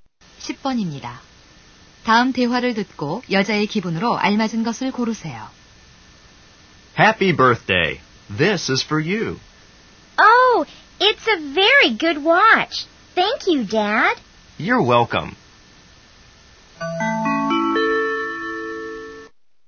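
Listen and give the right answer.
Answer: 기쁨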